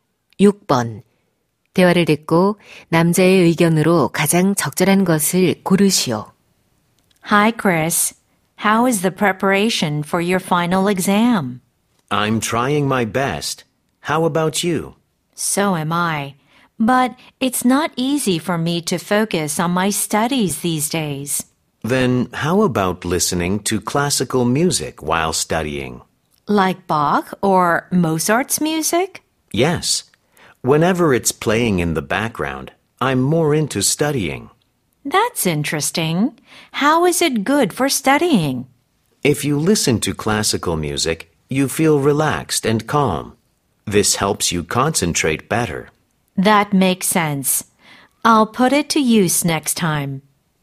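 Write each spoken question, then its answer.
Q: 대화를 듣고 남자의 의견으로 가장 적절한 것을 고르시오.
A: 클래식 음악을 들으면 공부에 집중하는 데 도움이 된다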